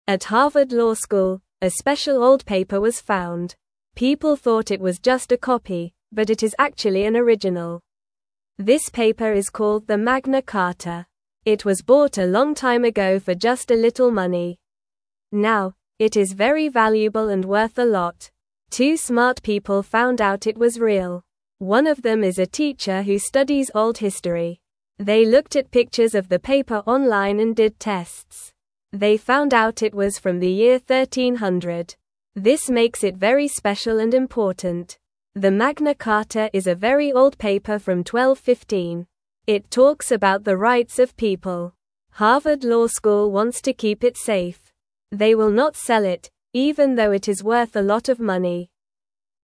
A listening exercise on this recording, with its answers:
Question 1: What special paper was found at Harvard Law School?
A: The Magna Carta.

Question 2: What is the name of the paper that is very old and important?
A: The Magna Carta.

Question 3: Who found out that the paper was real?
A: Two smart people, one is a teacher.

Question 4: What year did the paper come from?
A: The year 1300.

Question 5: Why is the Magna Carta important?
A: It talks about the rights of people.

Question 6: Does Harvard Law School want to sell the Magna Carta?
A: No, they want to keep it safe.

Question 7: When was the Magna Carta made?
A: It was made in 1215.

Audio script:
At Harvard Law School, a special old paper was found. People thought it was just a copy, but it is actually an original. This paper is called the Magna Carta. It was bought a long time ago for just a little money. Now, it is very valuable and worth a lot.
Two smart people found out it was real. One of them is a teacher who studies old history. They looked at pictures of the paper online and did tests. They found out it was from the year 1300. This makes it very special and important.
The Magna Carta is a very old paper from 1215. It talks about the rights of people. Harvard Law School wants to keep it safe. They will not sell it, even though it is worth a lot of money.

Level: Level 1